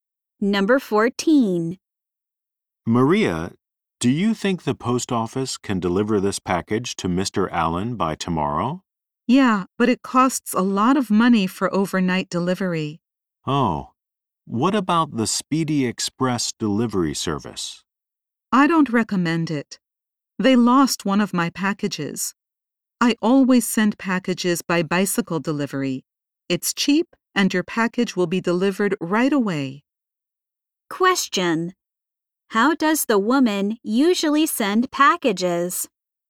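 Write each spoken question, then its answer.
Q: How does the woman usually send packages?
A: By bicycle delivery.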